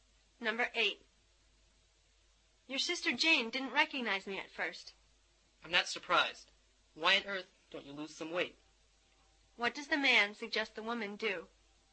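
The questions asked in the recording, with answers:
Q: What does the man suggest the woman do?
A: Lose some weight.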